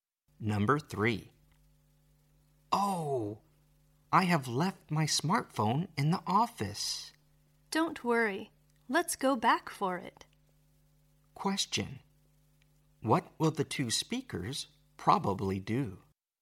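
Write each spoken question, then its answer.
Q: What will the 2 speakers probably do?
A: Go back to the office for the smartphone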